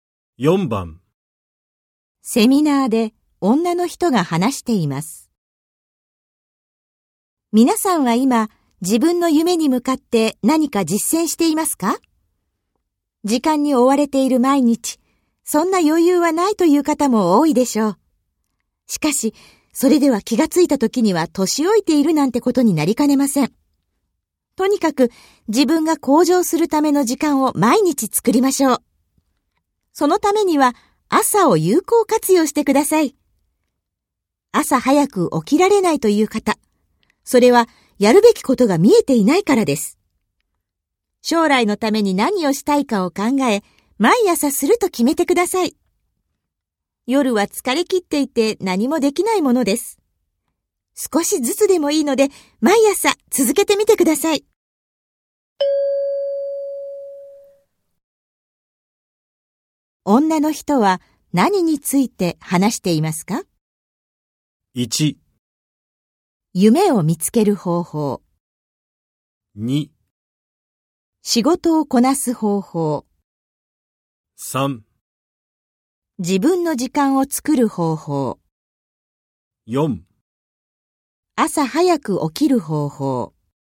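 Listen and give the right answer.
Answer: 3: 自分の時間を作る方法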